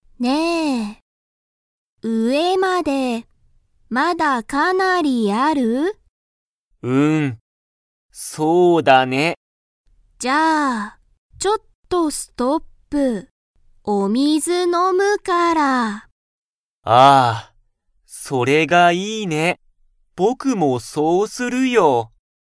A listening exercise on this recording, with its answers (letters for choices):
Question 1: ハルとユタカは、____を飲(の)んだ。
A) ジュース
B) 水(みず)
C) ビール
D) ワイン)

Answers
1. B